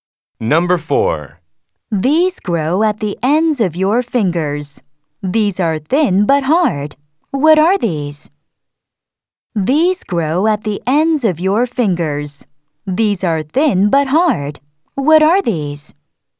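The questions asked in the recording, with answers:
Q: What are these?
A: fingernails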